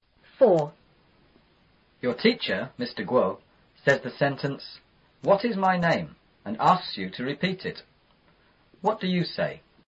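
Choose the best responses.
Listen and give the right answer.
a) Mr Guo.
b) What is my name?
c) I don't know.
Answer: b) What is my name?

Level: 初中英语广州版4B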